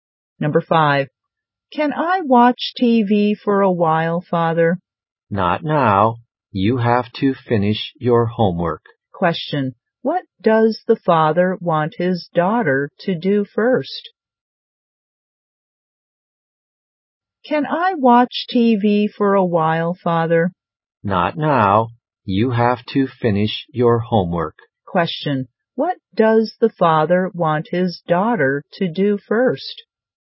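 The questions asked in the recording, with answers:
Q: Question, what does the father want his daughter to do first?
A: Finish her homework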